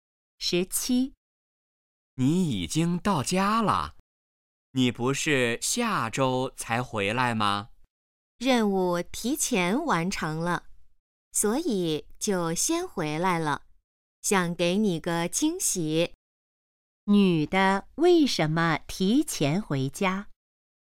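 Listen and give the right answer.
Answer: 任务提前完成了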